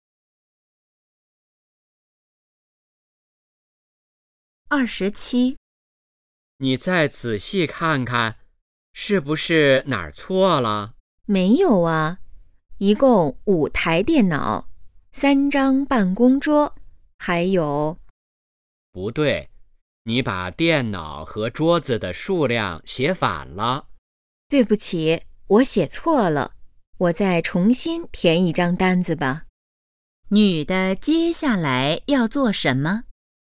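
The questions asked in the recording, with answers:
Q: 女的接下来要做什么?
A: 重新填一张单子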